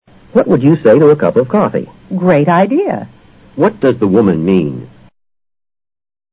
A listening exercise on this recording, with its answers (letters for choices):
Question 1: What does the woman mean?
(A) She'll sell him a cup of coffee.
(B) The coffee cup's too full.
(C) She'd like some coffee.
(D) Coffee's hard on her nerves.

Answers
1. C

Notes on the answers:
What would you say to...:...好吗?用于提出建议,征询意见。Great idea! 是对建议的积极反应,相当说"好极了"。